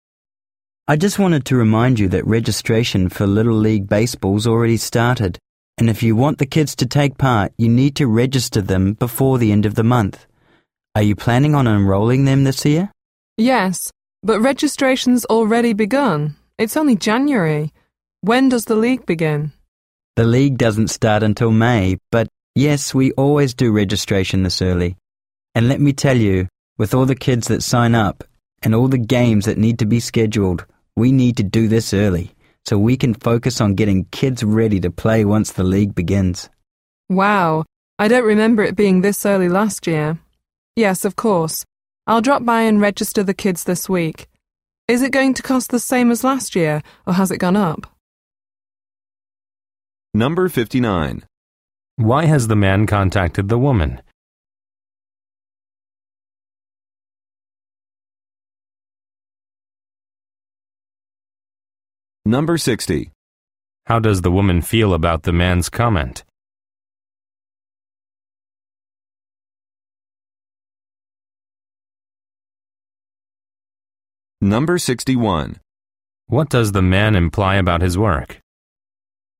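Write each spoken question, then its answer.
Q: Why has the man contacted the woman?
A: To remind her to register her kids for Little League before the end of the month

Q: How does the woman feel about the man's comment?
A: Surprised that registration starts so early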